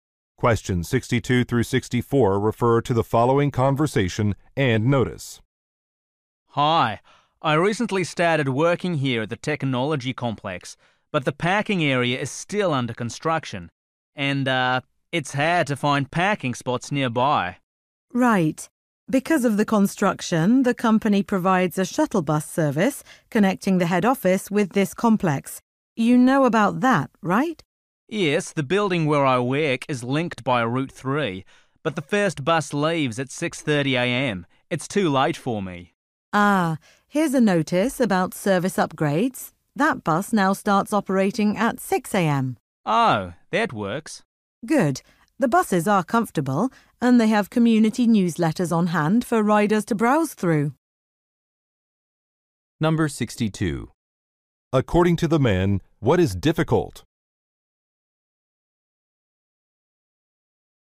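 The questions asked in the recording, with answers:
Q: According to the man, what is difficult?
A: Finding a parking spot nearby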